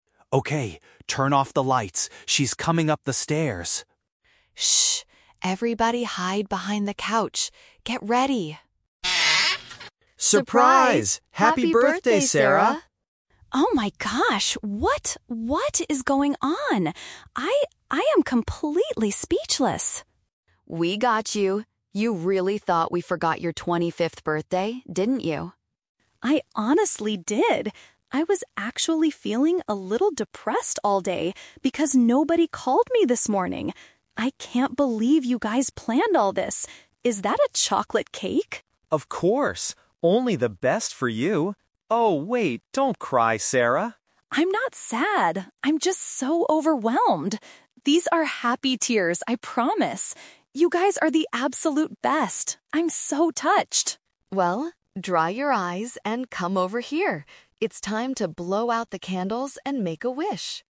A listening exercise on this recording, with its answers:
Listen to the conversation among a group of friends. Choose the correct answer (A, B, or C) for each question.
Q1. How was Sarah feeling earlier in the day?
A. She was excited to organize a big celebration for herself.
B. She felt a bit down because her friends didn't contact her.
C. She was angry because Mark ruined her birthday cake.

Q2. What is the main reason Sarah is crying?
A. She is deeply moved and experiencing strong positive emotions.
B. She is still feeling depressed about turning 25 years old.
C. She is upset because she dislikes being surprised by people.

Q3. What does Emma ask Sarah to do at the end of the conversation?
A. Hide behind the furniture with the rest of the guests.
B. Stop crying and participate in a birthday tradition.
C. Cut the chocolate cake and serve it to everyone.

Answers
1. B. She felt a bit down because her friends didn't contact her.
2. A. She is deeply moved and experiencing strong positive emotions.
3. B. Stop crying and participate in a birthday tradition.

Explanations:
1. Sarah says she was feeling "a little depressed all day because nobody called me this morning." "Depressed" is paraphrased as "down," and "nobody called" means her friends didn't contact her. The Trap (A): The audio is about her birthday, but her friends organized the party, not her. She actually thought everyone had forgotten. The Trap (C): Mark and a chocolate cake are mentioned, but Mark didn't ruin it; he says they got the best cake for her.
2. Sarah explains, "I'm not sad, I'm just so overwhelmed. These are happy tears... I'm so touched." Being "touched" and "overwhelmed" by "happy tears" perfectly matches "deeply moved and experiencing strong positive emotions." The Trap (B): The word "depressed" is in the audio, but she felt that way earlier in the day, not at the moment she is crying. The Plausible (C): Some people hate surprises and cry out of frustration, but Sarah clearly states they are "happy tears."

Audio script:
Mark: Okay, turn off the lights. She's coming up the stairs!
Emma: Shh! Everybody hide behind the couch. Get ready!
Group: SURPRISE! Happy Birthday, Sarah!
Sarah: Oh my gosh! What... what is going on? I... I am completely speechless!
Emma: We got you! You really thought we forgot your 25th birthday, didn't you?
Sarah: I honestly did! I was actually feeling a little depressed all day because nobody called me this morning. I can't believe you guys planned all this. Is that a chocolate cake?
Mark: Of course! Only the best for you. Oh, wait, don't cry, Sarah!
Sarah: I'm not sad, I'm just so overwhelmed. These are happy tears, I promise. You guys are the absolute best. I'm so touched.
Emma: Well, dry your eyes and come over here. It's time to blow out the candles and make a wish!

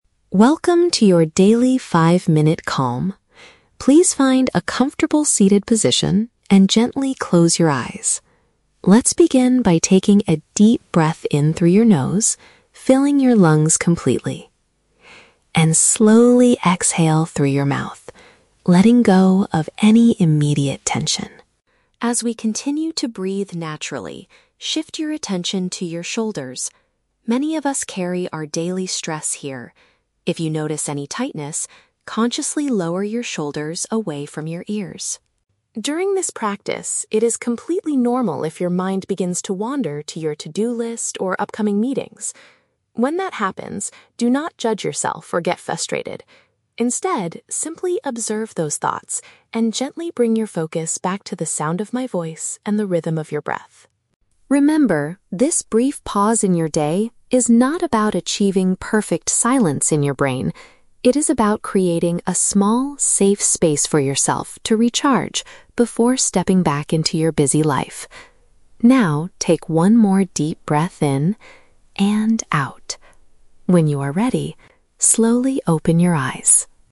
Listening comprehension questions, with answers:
Listen to a short guided meditation from an app. Choose the correct answer (A, B, or C) for each question.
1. What physical action does the instructor recommend for releasing stress?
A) Lying down completely flat on the floor.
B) Dropping the shoulders to reduce tightness.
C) Breathing in very deeply through the mouth.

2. How should listeners react if they start thinking about their work responsibilities?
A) Try very hard to make their minds completely quiet.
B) Stop the meditation exercise and finish their tasks.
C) Accept the thoughts without feeling upset or angry.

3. What is the main purpose of this five-minute break?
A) To recover mental energy before returning to daily activities.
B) To prepare the body for a long, deep night of sleep.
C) To mentally organize and plan for upcoming meetings.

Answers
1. B) Dropping the shoulders to reduce tightness.
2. C) Accept the thoughts without feeling upset or angry.
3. A) To recover mental energy before returning to daily activities.

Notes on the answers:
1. The Key: The instructor says, "If you notice any tightness, consciously lower your shoulders away from your ears." This is paraphrased perfectly as "Dropping the shoulders to reduce tightness". The Trap (C): The mouth is mentioned, but the instructor says to breathe in through the nose and exhale (breathe out) through the mouth. (Mentioned but wrong context). Plausible Trap (A): Lying down is a common meditation position, but the audio specifically asks the listener to find a "seated position" (Not mentioned).
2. The Key: The instructor says that if your mind wanders to your to-do list, "do not judge yourself or get frustrated. Instead, simply observe those thoughts." This is paraphrased as "Accept the thoughts without feeling upset or angry". The Trap (A): "Perfect silence" is mentioned, but the instructor explicitly states that the practice is not about achieving perfect silence in your brain (Mentioned but rejected). Plausible Trap (B): It is a plausible reaction for a busy person to stop and work, but it goes completely against the goal of the meditation app.
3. The Key: The audio states that the pause is about "creating a small, safe space for yourself to recharge before stepping back into your busy life". This matches the idea of recovering mental energy before returning to daily activities. The Trap (C): "Upcoming meetings" and a "to-do list" are mentioned, but only as examples of distracting thoughts, not the goal of the session (Mentioned but wrong context).

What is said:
Please find a comfortable seated position and gently close your eyes. Let's begin by taking a deep breath in through your nose, filling your lungs completely... and slowly exhale through your mouth, letting go of any immediate tension.
As we continue to breathe naturally, shift your attention to your shoulders. Many of us carry our daily stress here. If you notice any tightness, consciously lower your shoulders away from your ears.
During this practice, it is completely normal if your mind begins to wander to your to-do list or upcoming meetings. When that happens, do not judge yourself or get frustrated. Instead, simply observe those thoughts, and gently bring your focus back to the sound of my voice and the rhythm of your breath.
Remember, this brief pause in your day is not about achieving perfect silence in your brain; it is about creating a small, safe space for yourself to recharge before stepping back into your busy life. Now, take one more deep breath in... and out. When you are ready, slowly open your eyes.

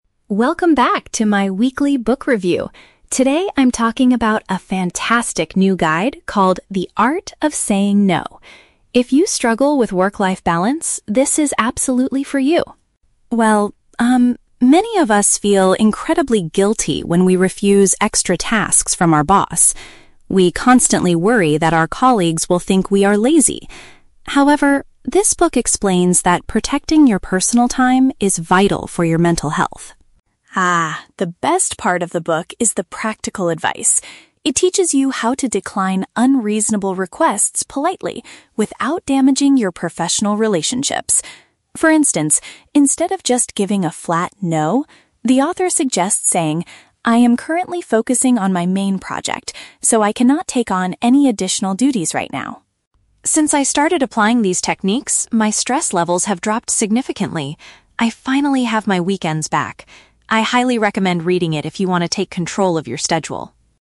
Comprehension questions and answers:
Listen to a reviewer talking about a book and choose the correct answer (A, B, or C).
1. According to the reviewer, what is a common problem people face at work?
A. They experience guilt when they turn down more work.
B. They complain that their managers give them unreasonable deadlines.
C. They are often too lazy to complete their daily assignments.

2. What method does the author recommend for declining a task?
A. Giving a very short and direct answer to your manager.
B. Stating that you are already occupied with other work.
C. Ignoring your colleagues so they cannot ask you for help.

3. How did the reviewer's life change after reading the book?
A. Her feeling of tension and worry was greatly reduced.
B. She was able to finish her main project before the weekend.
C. She received a promotion for communicating politely.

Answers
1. A. They experience guilt when they turn down more work.
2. B. Stating that you are already occupied with other work.
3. A. Her feeling of tension and worry was greatly reduced.

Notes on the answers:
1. The reviewer states that "many of us feel incredibly guilty when we refuse extra tasks." The phrase "experience guilt" is a synonym for feel guilty, and "turn down more work" is a paraphrase of refusing extra tasks. Trap Analysis: Option (C) is the trap. The word "lazy" is mentioned in the audio, but it is what people worry their colleagues will think, not that they are actually lazy. Option (B) is a plausible workplace issue but is never mentioned.
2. The author suggests saying, "I am currently focusing on my main project." This means you should explain that you are already busy or "occupied with other work." Trap Analysis: Option (A) is the trap. The reviewer mentions a "flat no" (a short and direct answer), but she says you should do this instead of just giving a flat no (meaning you should avoid doing it). Option (C) is not mentioned in the audio.
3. The reviewer says, "my stress levels have dropped significantly." "Tension and worry" is a paraphrase of stress, and "greatly reduced" means dropped significantly. Trap Analysis: Option (B) is the trap. The script mentions "main project" and "weekends," but she didn't finish one specific project before the weekend; she got her free time (weekends) back in general. Option (C) is a trap because the word "politely" is used in the audio, but a promotion is never mentioned.

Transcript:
Reviewer: Welcome back to my weekly book review! Today, I'm talking about a fantastic new guide called The Art of Saying No. If you struggle with work-life balance, this is absolutely for you.
Well, um, many of us feel incredibly guilty when we refuse extra tasks from our boss. We constantly worry that our colleagues will think we are lazy. However, this book explains that protecting your personal time is vital for your mental health.
Ah, the best part of the book is the practical advice. It teaches you how to decline unreasonable requests politely, without damaging your professional relationships. For instance, instead of just giving a flat "no," the author suggests saying, "I am currently focusing on my main project, so I cannot take on any additional duties right now."
Since I started applying these techniques, my stress levels have dropped significantly. I finally have my weekends back! I highly recommend reading it if you want to take control of your schedule.

